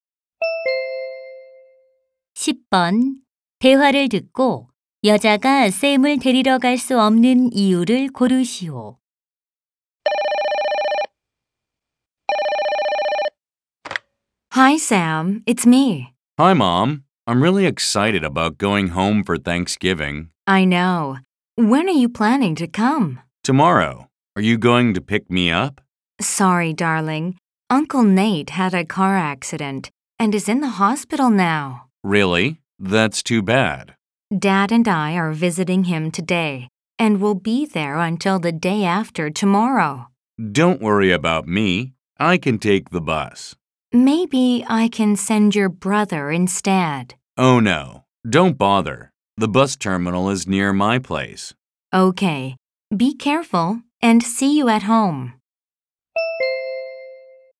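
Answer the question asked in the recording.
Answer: 교통사고로 입원한 삼촌을 방문해야 해서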